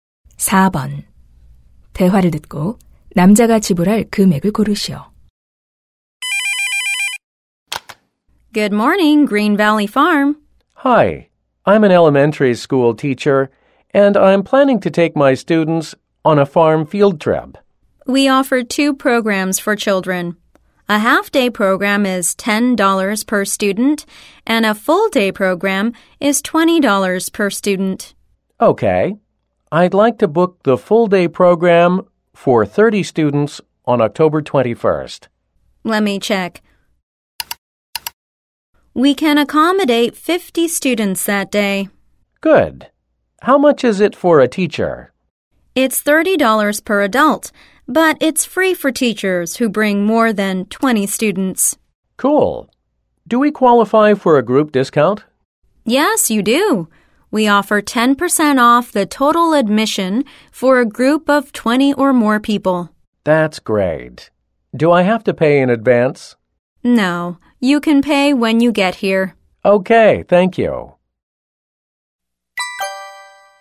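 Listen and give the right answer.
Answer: $540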